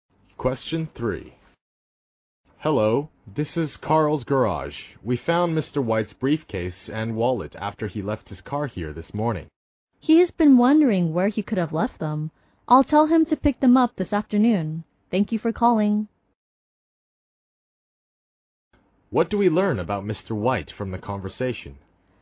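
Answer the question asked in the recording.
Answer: He left his briefcase and wallet at the garage.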